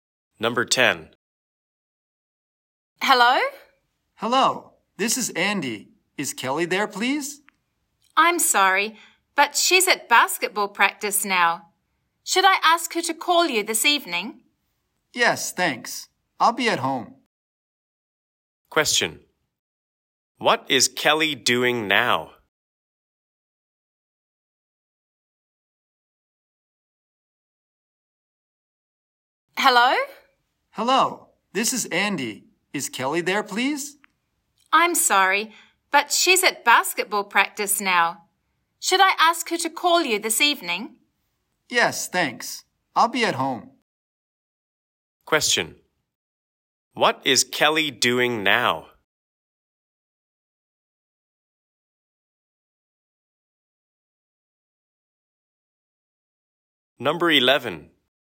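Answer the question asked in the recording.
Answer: Basketball practice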